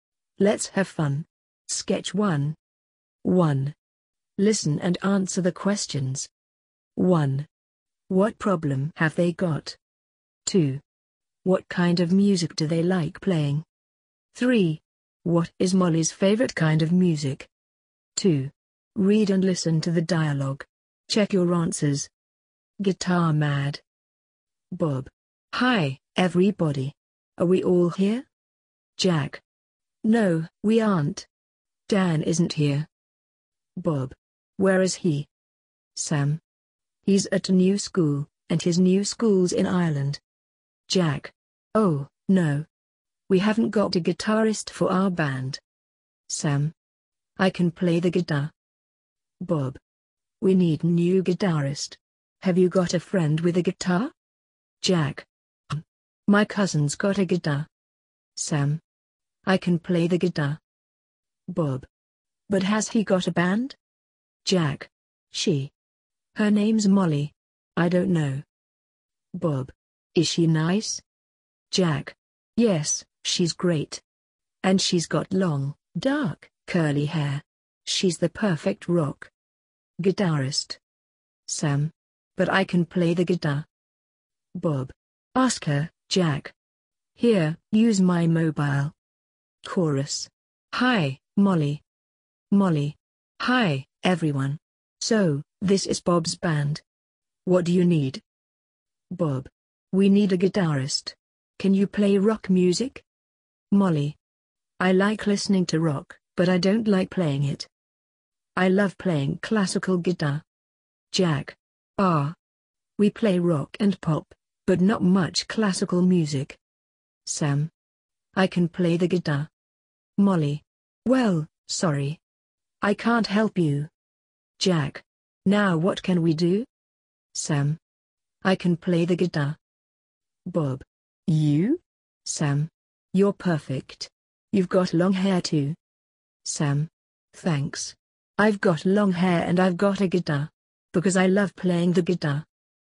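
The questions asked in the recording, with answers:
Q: What problem have they got?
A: They haven't got a guitarist for their band.

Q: What kind of music do they like playing?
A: Rock and pop

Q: What is Molly's favorite kind of music?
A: Classical guitar music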